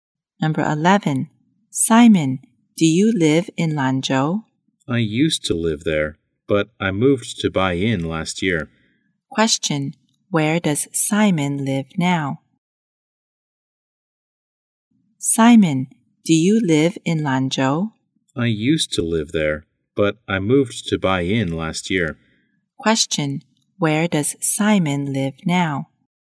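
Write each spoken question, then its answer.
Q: Question, where does Simon live now?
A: In Bai'in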